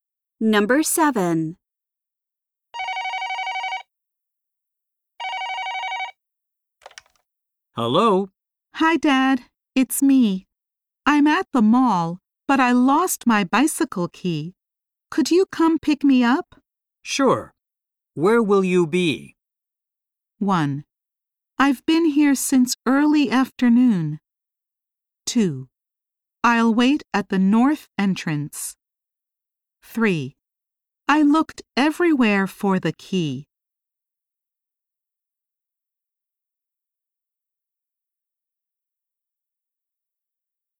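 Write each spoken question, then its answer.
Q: Sure. Where will you be?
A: 2: I'll wait at the north entrance.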